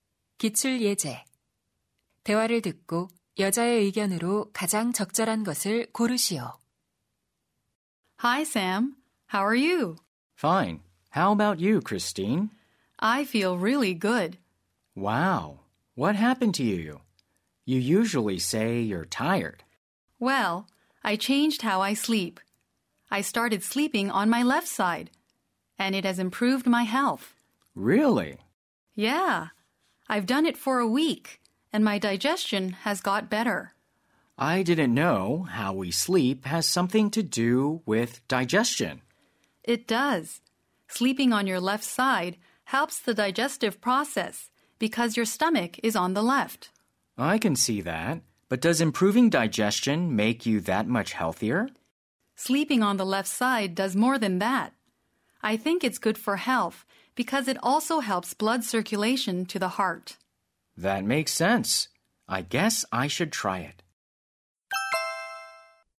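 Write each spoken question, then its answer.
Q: 대화를 듣고 여자의 의견으로 가장 적절한 것을 고르시오.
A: 왼쪽으로 누워 자는 것이 건강에 좋다.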